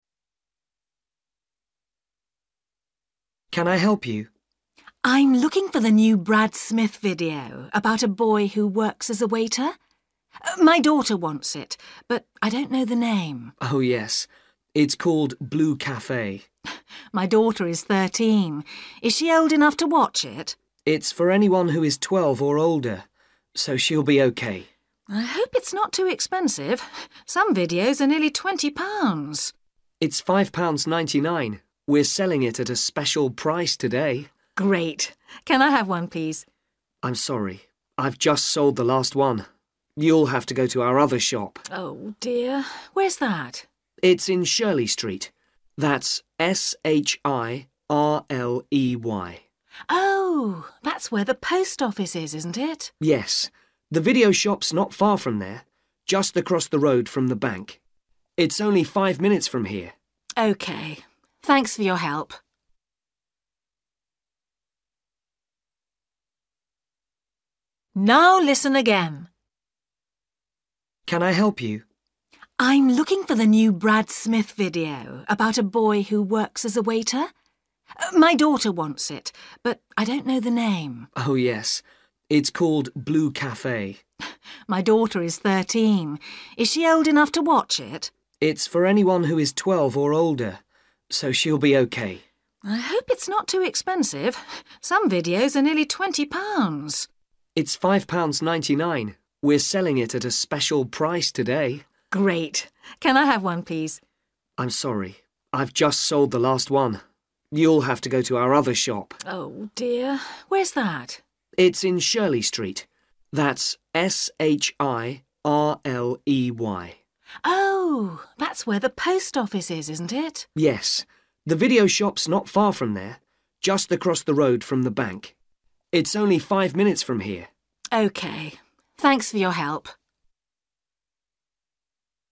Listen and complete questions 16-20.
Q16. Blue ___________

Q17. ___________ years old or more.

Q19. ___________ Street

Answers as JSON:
{"16": "Café", "17": "12 / twelve", "19": "Shirley"}

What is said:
Man: Can I help you?
Woman: I'm looking for the new Brad Smith video about a boy who works as a waiter. My daughter wants it, but I don't know the name.
Man: Oh yes. It's called Blue Café.
Woman: My daughter is 13. Is she old enough to watch it?
Man: It's for anyone who is 12 or older, so she'll be OK.
Woman: I hope it's not too expensive. Some videos are nearly twenty pounds.
Man: It's five pounds ninety-nine. We're selling it at a special price today.
Woman: Great. Can I have one, please?
Man: I'm sorry. I've just sold the last one. You'll have to go to our other shop.
Woman: Oh dear. Where's that?
Man: It's in Shirley Street. That's S H I R L E Y.
Woman: Oh, that's where the post office is, isn't it?
Man: Yes, the video shop's not far from there, just across the road from the bank. It's only five minutes from here.
Woman: OK. Thanks for your help.

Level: A2